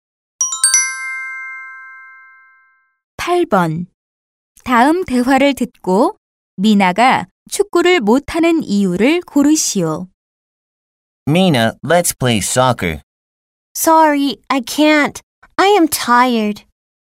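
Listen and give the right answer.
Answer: 피곤해서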